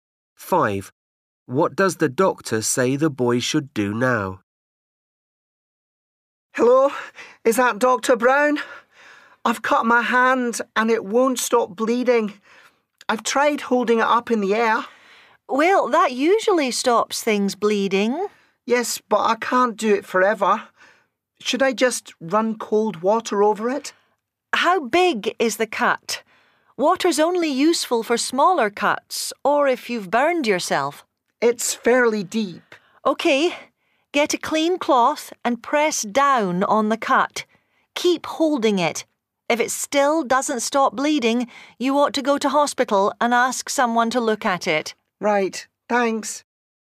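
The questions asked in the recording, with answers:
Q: What does the doctor say the boy should do now?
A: press a clean cloth down on the cut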